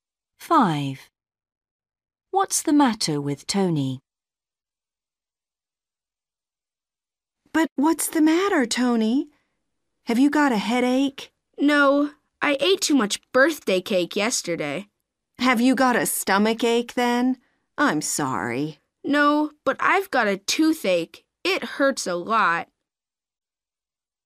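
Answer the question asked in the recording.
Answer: He has a toothache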